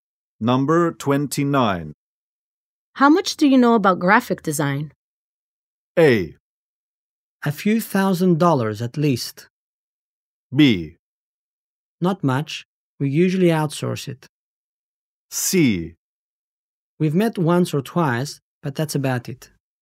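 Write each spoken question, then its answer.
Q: How much do you know about graphic design?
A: B: Not much. We usually outsource it.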